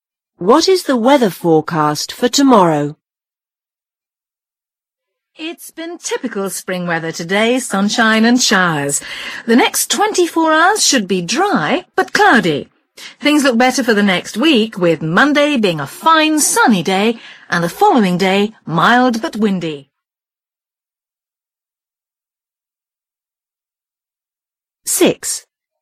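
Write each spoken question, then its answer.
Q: What is the weather forecast for tomorrow?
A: dry but cloudy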